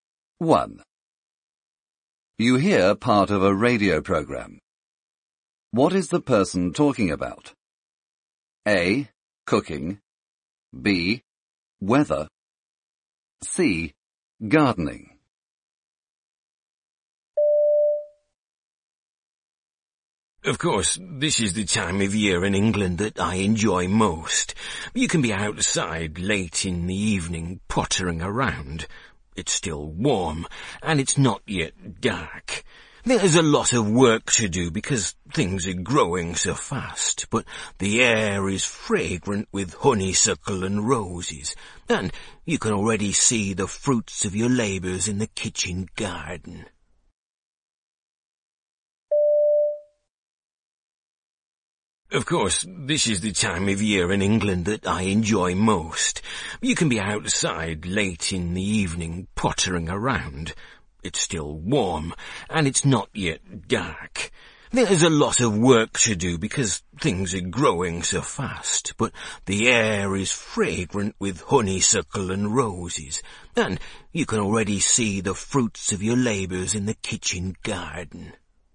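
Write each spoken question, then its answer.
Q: What is the person talking about?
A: C: Gardening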